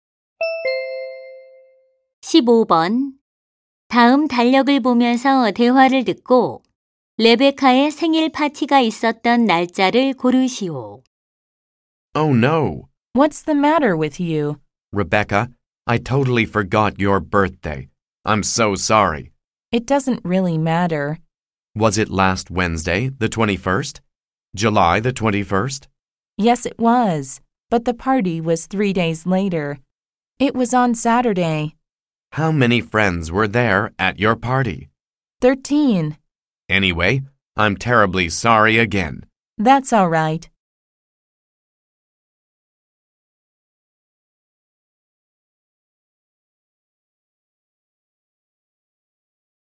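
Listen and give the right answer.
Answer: 7월 24일 (토요일)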